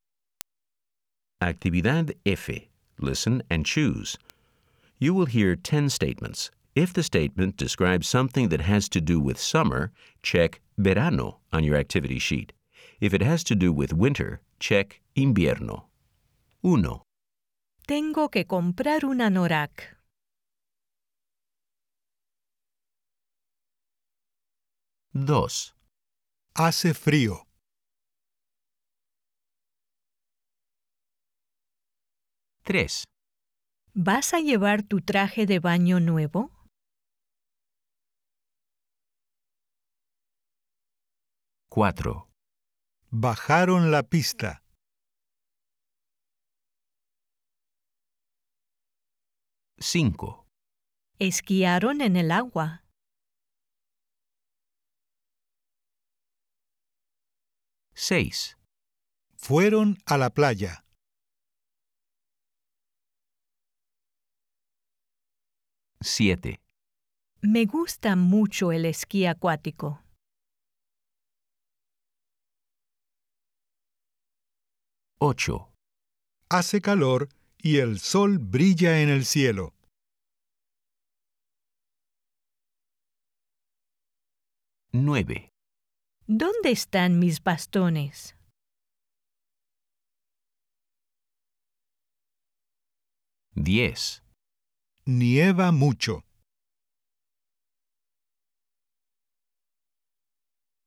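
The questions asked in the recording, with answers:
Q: Tengo que comprar un anorak.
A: invierno

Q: Hace frío.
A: invierno

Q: ¿Vas a llevar tu traje de baño nuevo?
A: verano

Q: Bajaron la pista.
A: invierno

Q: Esquiaron en el agua.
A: verano

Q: Fueron a la playa.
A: verano

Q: Me gusta mucho el esquí acuático.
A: verano

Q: Hace calor y el sol brilla en el cielo.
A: verano

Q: ¿Dónde están mis bastones?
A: invierno

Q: Nieva mucho.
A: invierno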